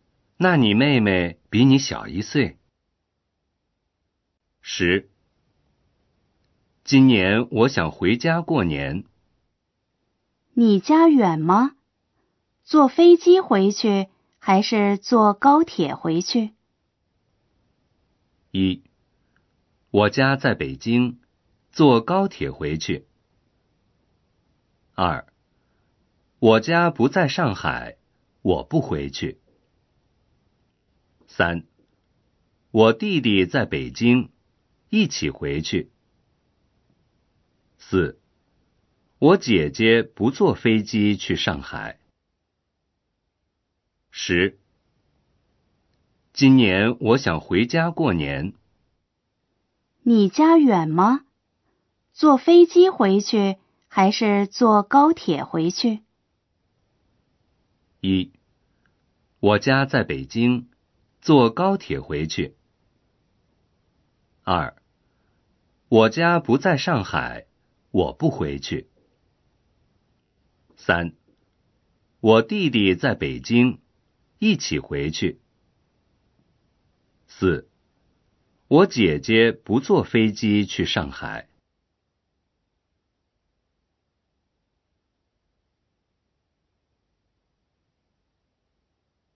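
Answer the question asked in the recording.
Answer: 1: 我家在北京,坐高铁回去。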